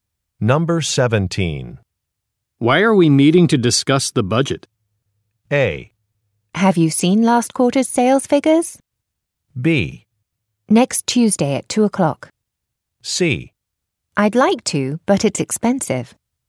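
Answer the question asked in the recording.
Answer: A: Have you seen last quarter's sales figures?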